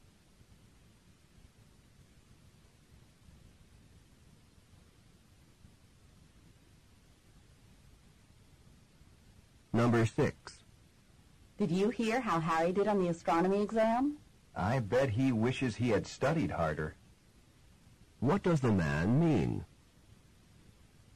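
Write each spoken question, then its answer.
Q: What does the man mean?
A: Harry did not study hard and did poorly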